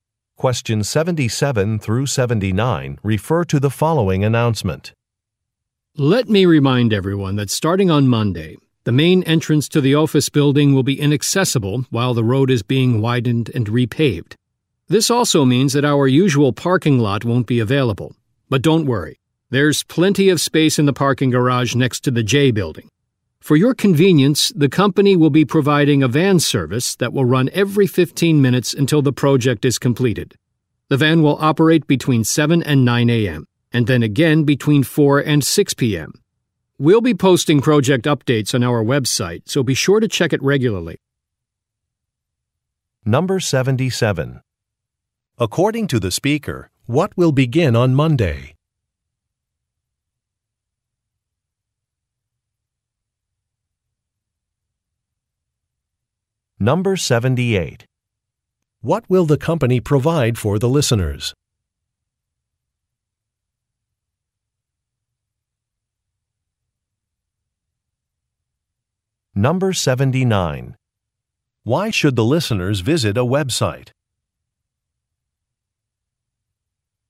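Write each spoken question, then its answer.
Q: According to the speaker, what will begin on Monday?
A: Road widening and repaving work (main entrance closed)

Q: What will the company provide for the listeners?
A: A van service

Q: Why should the listeners visit a website?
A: To get project updates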